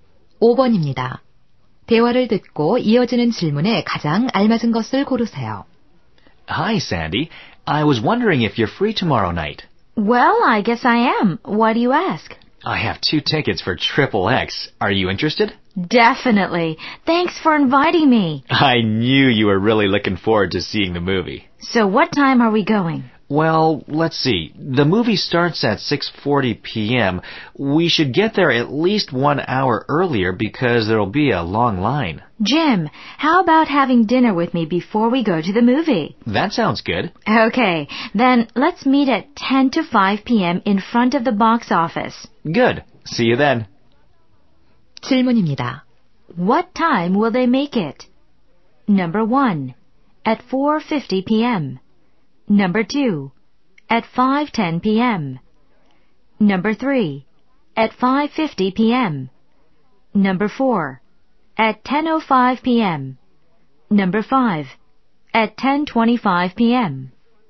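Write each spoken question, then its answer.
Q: What time will they make it?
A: 1: At 4:50 p.m.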